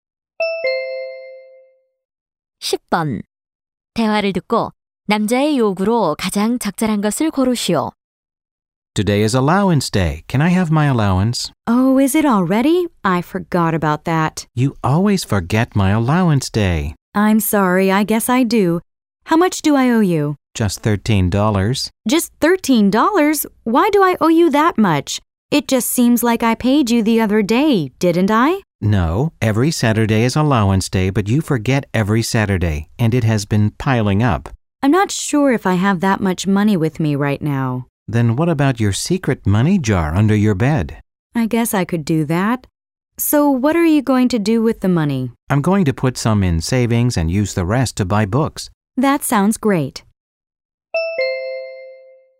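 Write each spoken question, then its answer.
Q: 대화를 듣고 남자의 요구로 가장 적절한 것을 고르시오.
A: 밀린 용돈 주기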